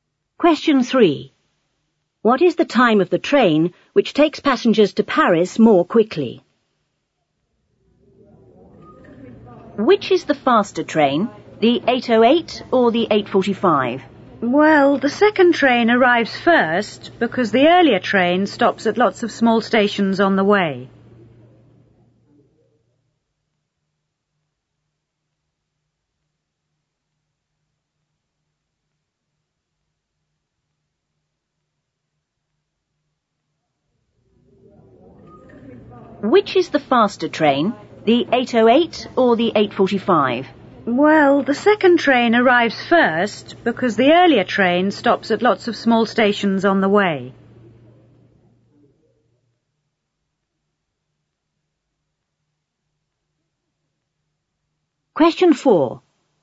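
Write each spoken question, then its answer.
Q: What is the time of the train which takes passengers to Paris more quickly?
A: 8:45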